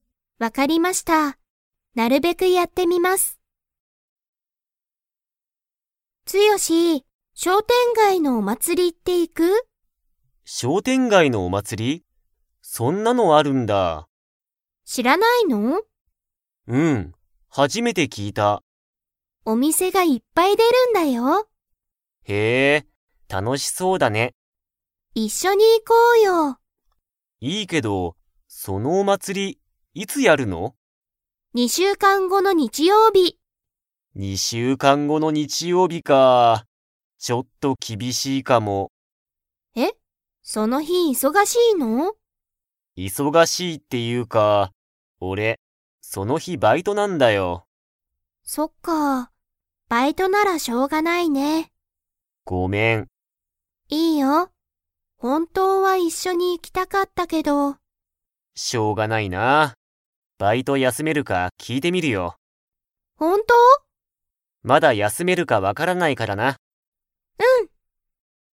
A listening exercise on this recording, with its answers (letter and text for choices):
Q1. ツヨシは、商店街しょうてんがいのお祭まつりについて 。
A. 初はじめて聞きいた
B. 前まえから知しっていた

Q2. 二週間にしゅうかん後ごの日曜日にちようび、ツヨシは何なにがありますか?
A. 授業じゅぎょう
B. バイト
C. 食事しょくじ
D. カラオケ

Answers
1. A. 初はじめて聞きいた
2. B. バイト

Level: Level 4